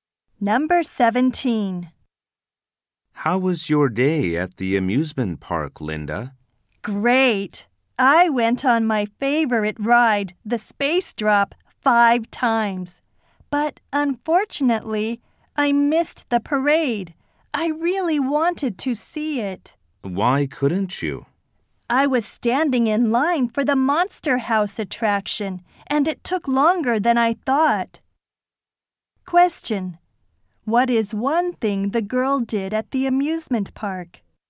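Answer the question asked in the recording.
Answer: She rode the Space Drop five times.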